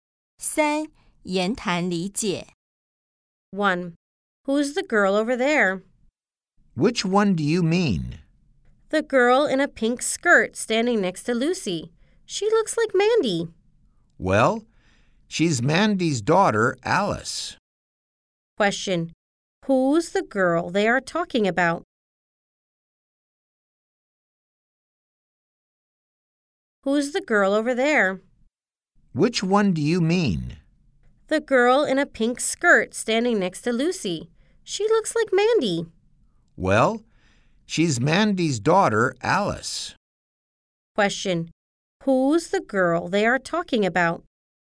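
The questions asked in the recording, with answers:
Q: Who's the girl they are talking about?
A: Alice, Mandy's daughter, the girl in a pink skirt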